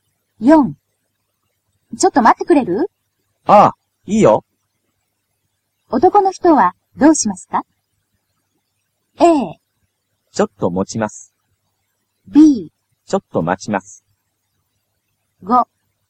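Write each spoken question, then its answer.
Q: 男の人はどうしますか?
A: B: ちょっと待ちます。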